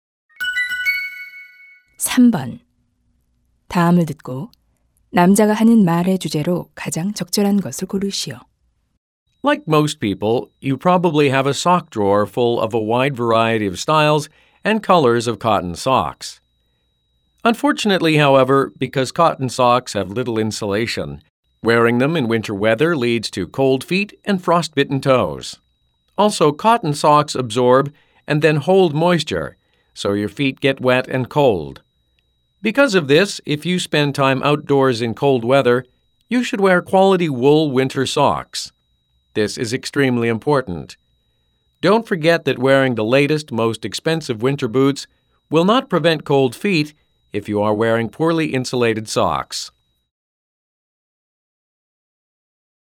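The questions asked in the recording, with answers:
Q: 다음을 듣고 남자가 하는 말의 주제로 가장 적절한 것을 고르시오.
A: 추운 날씨에 양모 양말을 신어야 하는 이유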